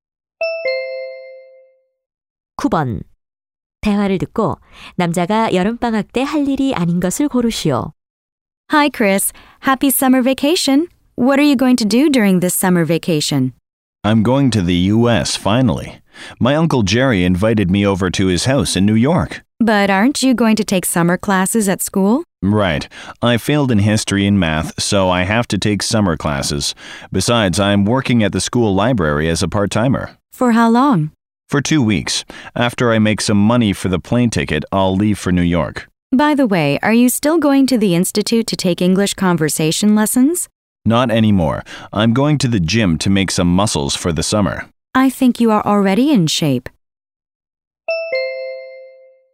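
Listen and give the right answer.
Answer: 영어 회화 수업 듣기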